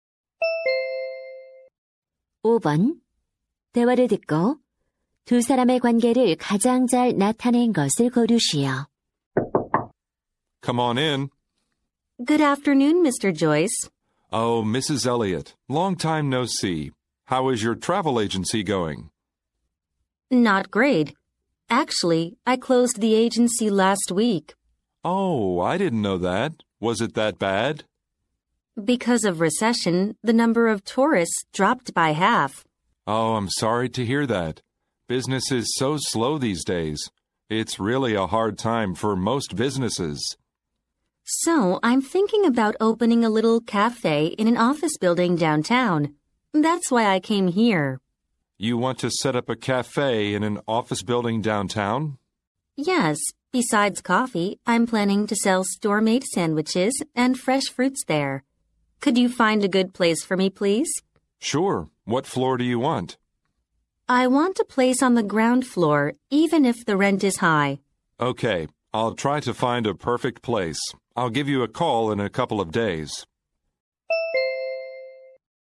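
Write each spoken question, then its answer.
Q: 대화를 듣고 두 사람의 관계를 가장 잘 나타낸 것을 고르시오.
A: 부동산 중개인 - 고객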